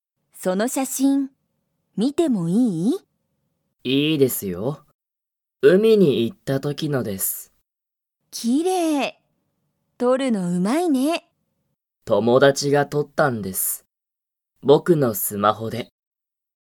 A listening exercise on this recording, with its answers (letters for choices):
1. その写真(しゃしん)は、____が撮(と)った。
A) 鈴木(すずき)さん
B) 松井(まつい)さん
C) 鈴木(すずき)さんの友達(ともだち)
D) 松井(まつい)さんの友達(ともだち)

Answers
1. C

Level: Level 1